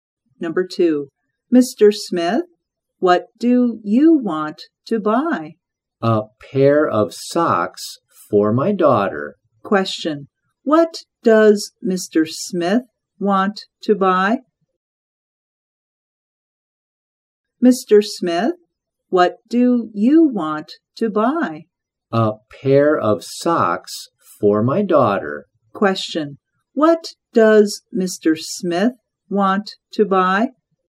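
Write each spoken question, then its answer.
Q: what does Mr. Smith want to buy?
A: a pair of socks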